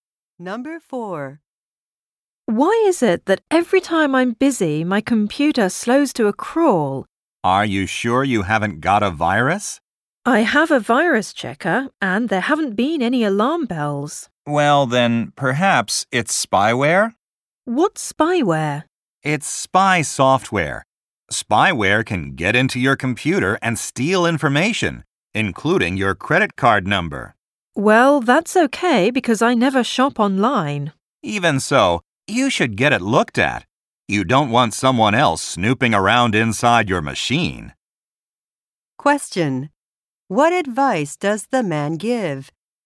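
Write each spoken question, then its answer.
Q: What advice does the man give?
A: Get the computer looked at, as it may have spyware.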